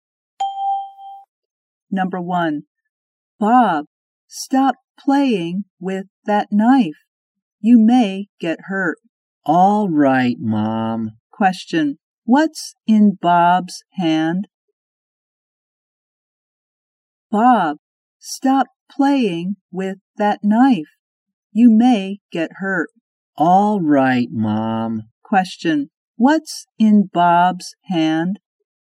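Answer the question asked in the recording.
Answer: A knife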